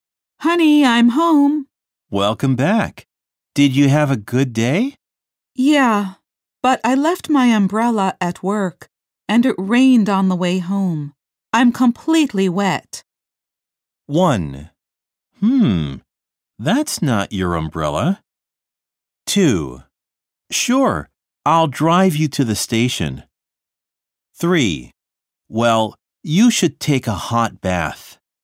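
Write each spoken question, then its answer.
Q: I'm completely wet.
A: 3: Well, you should take a hot bath.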